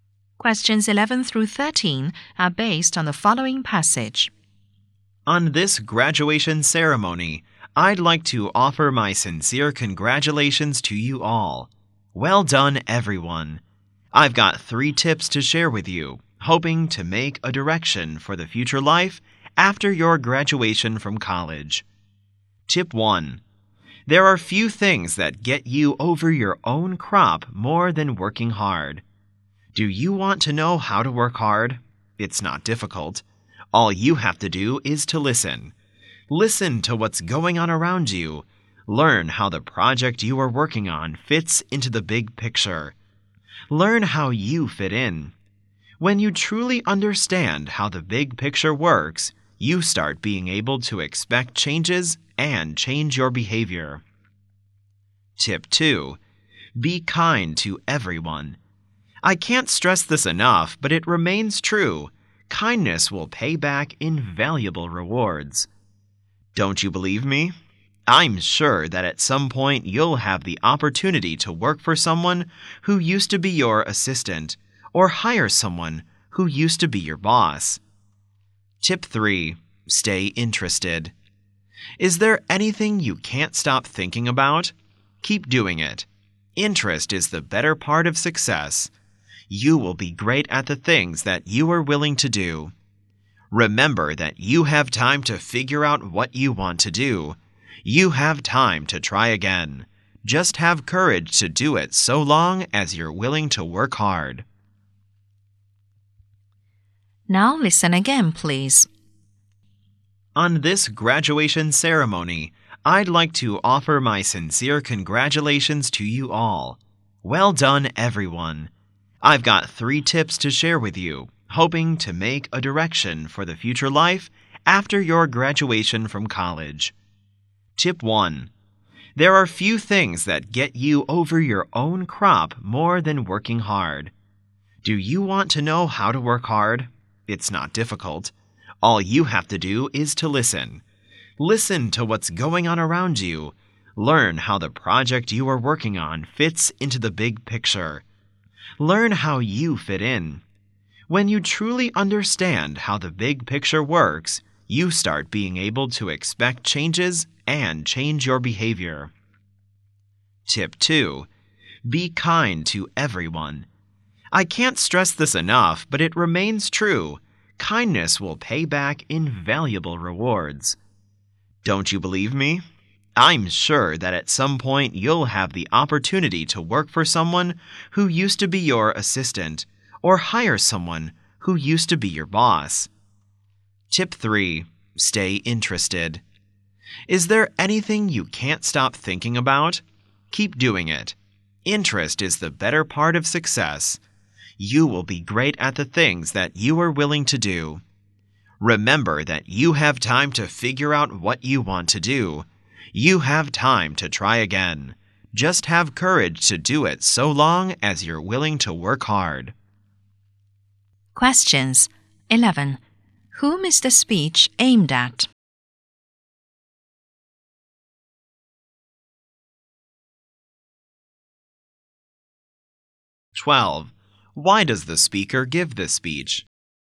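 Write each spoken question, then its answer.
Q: Whom is the speech aimed at?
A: College graduates

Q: Why does the speaker give this speech?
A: To give graduates tips for their future life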